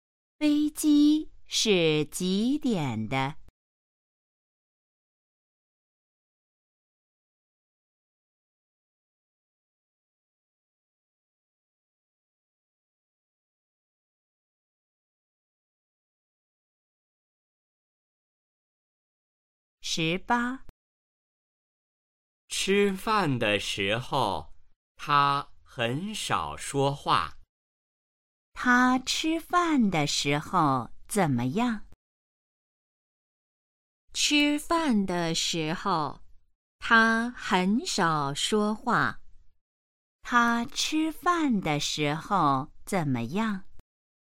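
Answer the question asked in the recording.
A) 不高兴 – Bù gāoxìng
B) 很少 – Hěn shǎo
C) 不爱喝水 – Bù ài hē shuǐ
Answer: B) 很少 – Hěn shǎo

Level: HSK1- Đề 04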